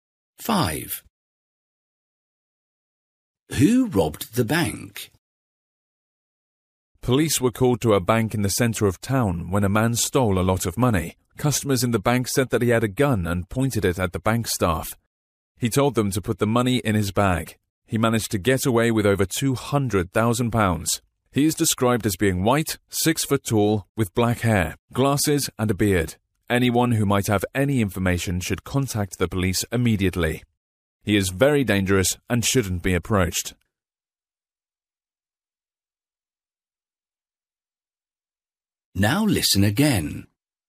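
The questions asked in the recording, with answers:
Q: Who robbed the bank?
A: A tall white man with black hair, glasses and a beard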